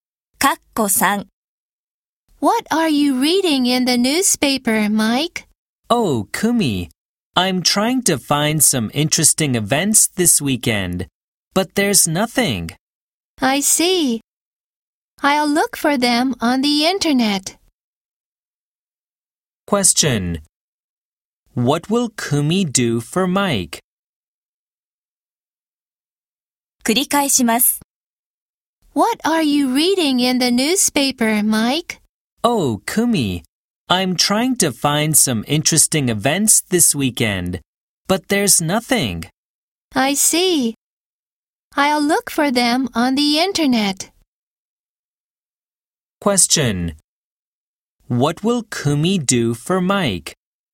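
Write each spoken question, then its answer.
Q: What will Kumi do for Mike?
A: Look for interesting events on the internet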